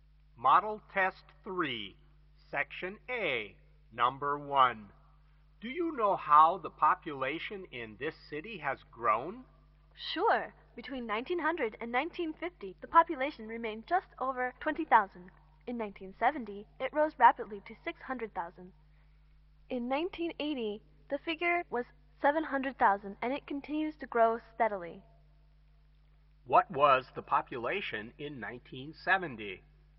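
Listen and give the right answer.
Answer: 600,000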